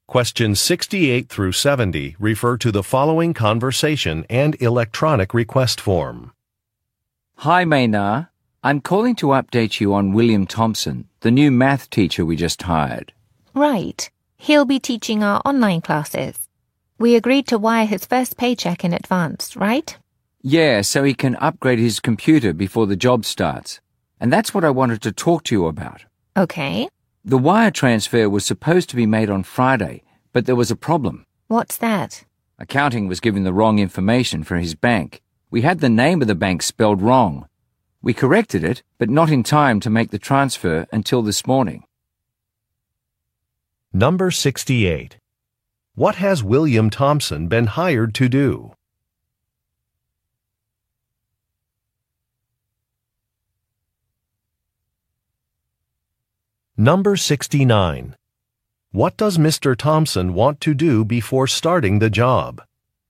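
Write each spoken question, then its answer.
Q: What has William Thompson been hired to do?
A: Teach math online

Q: What does Mr. Thompson want to do before starting the job?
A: Upgrade his computer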